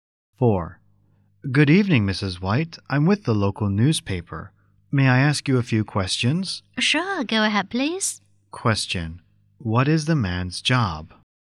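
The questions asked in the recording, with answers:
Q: What is the man's job?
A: A newspaper reporter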